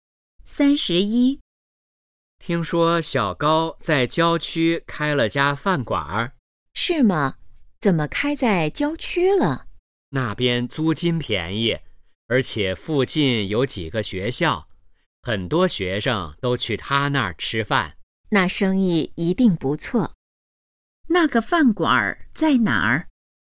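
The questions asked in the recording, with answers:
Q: 那个饭馆在哪儿?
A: 郊区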